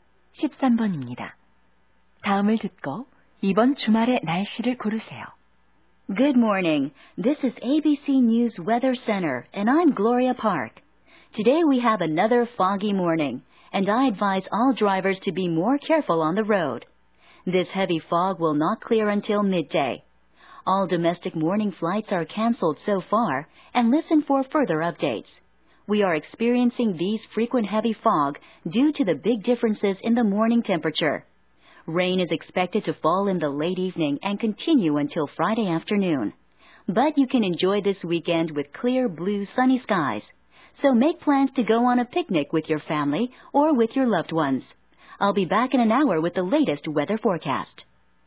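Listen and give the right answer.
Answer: 맑음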